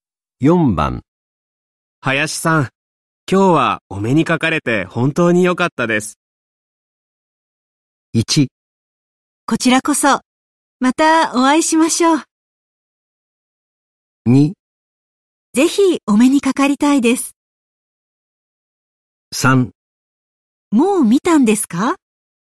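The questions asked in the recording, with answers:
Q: 林さん、今日はお目にかかれて本当に良かったです。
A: 1: こちらこそ、またお会いしましょう。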